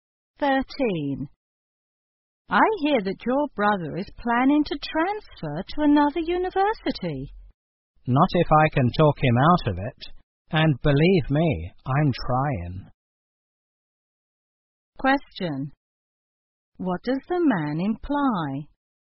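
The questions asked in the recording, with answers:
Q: What does the man imply?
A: He is trying to persuade his brother not to transfer.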